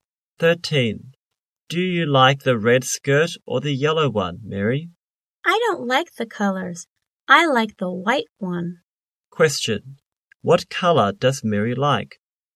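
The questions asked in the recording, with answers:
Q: Question. What color does Mary like?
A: White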